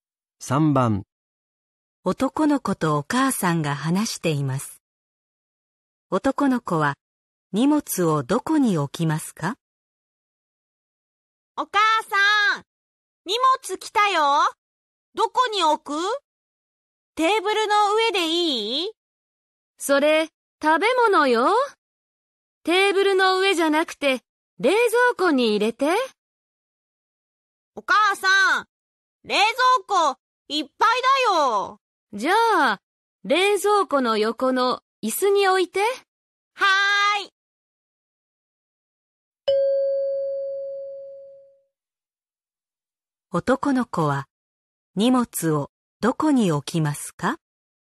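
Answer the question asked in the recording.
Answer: 冷蔵庫の横の椅子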